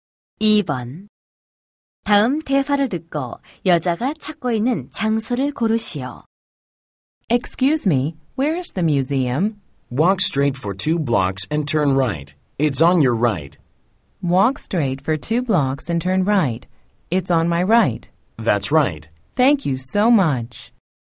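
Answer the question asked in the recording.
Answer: 박물관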